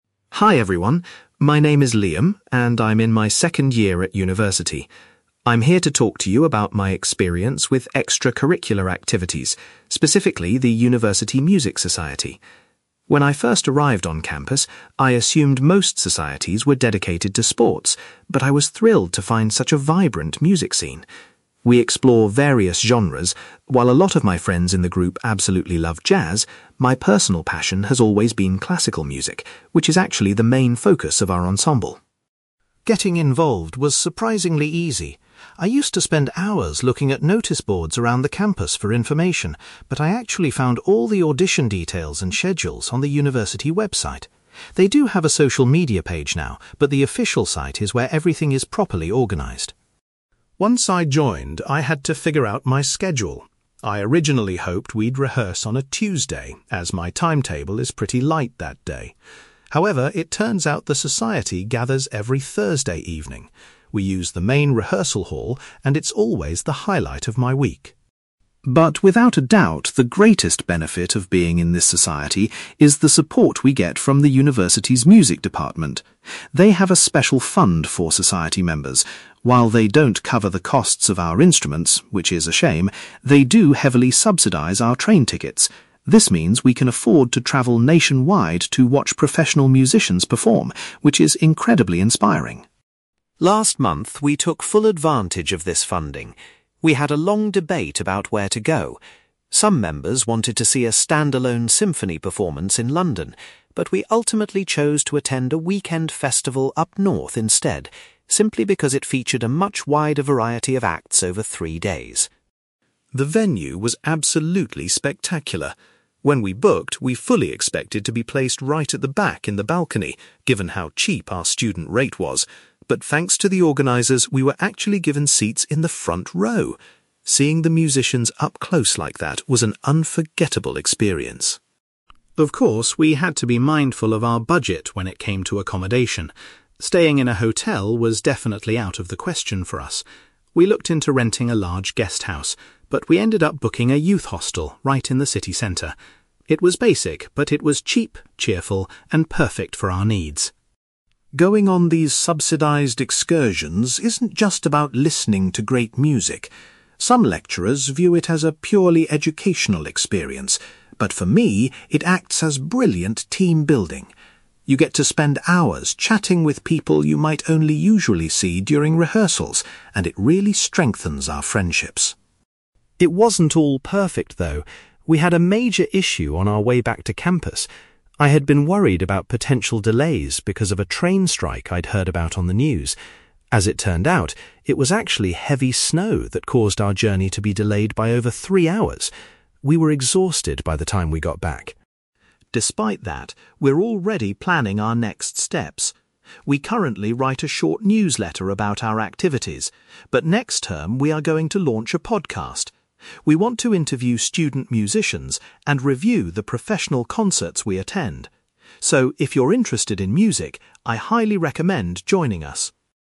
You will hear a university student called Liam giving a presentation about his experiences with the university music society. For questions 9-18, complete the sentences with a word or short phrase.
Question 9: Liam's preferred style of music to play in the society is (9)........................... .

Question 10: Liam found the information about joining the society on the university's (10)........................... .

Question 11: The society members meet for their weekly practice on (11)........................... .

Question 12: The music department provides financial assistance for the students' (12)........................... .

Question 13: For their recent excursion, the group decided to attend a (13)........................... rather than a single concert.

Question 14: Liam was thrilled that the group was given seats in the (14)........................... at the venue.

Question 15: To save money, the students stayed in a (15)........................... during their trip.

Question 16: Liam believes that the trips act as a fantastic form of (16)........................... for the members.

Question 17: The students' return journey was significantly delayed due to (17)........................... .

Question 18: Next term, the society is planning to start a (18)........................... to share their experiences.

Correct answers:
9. classical music
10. website
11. Thursday
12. train tickets
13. festival
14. front row
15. youth hostel
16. team-building
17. heavy snow
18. podcast

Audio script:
Liam: Hi everyone, my name is Liam, and I'm in my second year at university. I'm here to talk to you about my experience with extracurricular activities, specifically the university music society. When I first arrived on campus, I assumed most societies were dedicated to sports, but I was thrilled to find such a vibrant music scene. We explore various genres; while a lot of my friends in the group absolutely love jazz, my personal passion has always been classical music, which is actually the main focus of our ensemble.
Getting involved was surprisingly easy. I used to spend hours looking at noticeboards around the campus for information, but I actually found all the audition details and schedules on the university website. They do have a social media page now, but the official site is where everything is properly organized.
Once I joined, I had to figure out my schedule. I originally hoped we'd rehearse on a Tuesday, as my timetable is pretty light that day. However, it turns out the society gathers every Thursday evening. We use the main rehearsal hall, and it's always the highlight of my week.
But without a doubt, the greatest benefit of being in this society is the support we get from the university's music department. They have a special fund for society members. While they don't cover the costs of our instruments, which is a shame, they do heavily subsidize our train tickets. This means we can afford to travel nationwide to watch professional musicians perform, which is incredibly inspiring.
Last month, we took full advantage of this funding. We had a long debate about where to go. Some members wanted to see a standalone symphony performance in London, but we ultimately chose to attend a weekend festival up north instead, simply because it featured a much wider variety of acts over three days.
The venue was absolutely spectacular. When we booked, we fully expected to be placed right at the back in the balcony, given how cheap our student rate was. But thanks to the organizers, we were actually given seats in the front row! Seeing the musicians up close like that was an unforgettable experience.
Of course, we had to be mindful of our budget when it came to accommodation. Staying in a hotel was definitely out of the question for us. We looked into renting a large guest house, but we ended up booking a youth hostel right in the city centre. It was basic, but it was cheap, cheerful, and perfect for our needs.
Going on these subsidized excursions isn't just about listening to great music. Some lecturers view it as a purely educational experience, but for me, it acts as brilliant team-building. You get to spend hours chatting with people you might only usually see during rehearsals, and it really strengthens our friendships.
It wasn't all perfect, though. We had a major issue on our way back to campus. I had been worried about potential delays because of a train strike I'd heard about on the news. As it turned out, it was actually heavy snow that caused our journey to be delayed by over three hours! We were exhausted by the time we got back.
Despite that, we're already planning our next steps. We currently write a short newsletter about our activities, but next term we are going to launch a podcast. We want to interview student musicians and review the professional concerts we attend. So, if you're interested in music, I highly recommend joining us!

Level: B2